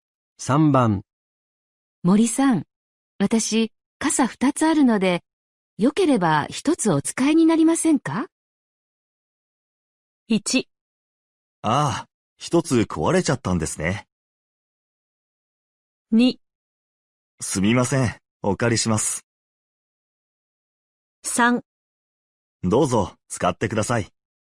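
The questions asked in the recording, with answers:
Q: 森さん、私、傘2つあるので、よければ1つお使いになりませんか?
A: 2: すみません、お借りします。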